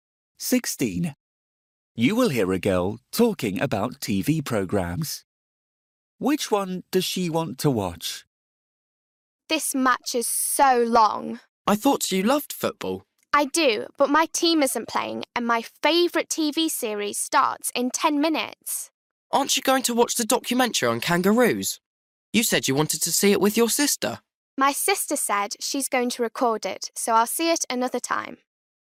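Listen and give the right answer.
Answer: Her favourite TV series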